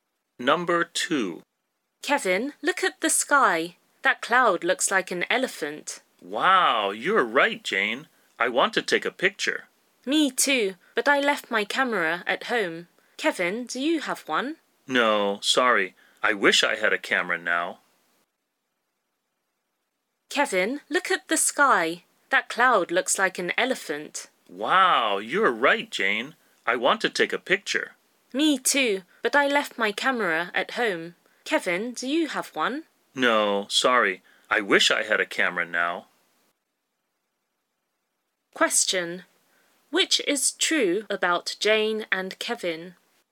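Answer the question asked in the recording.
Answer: Neither of them has a camera now, so they can't take a picture of the cloud.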